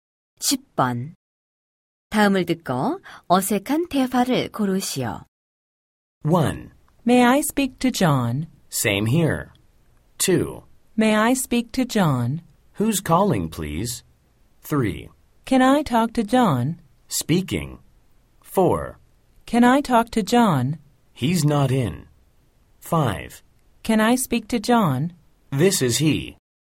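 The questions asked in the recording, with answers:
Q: 다음을 듣고 어색한 대화를 고르시오.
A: 1: May I speak to John? Same here.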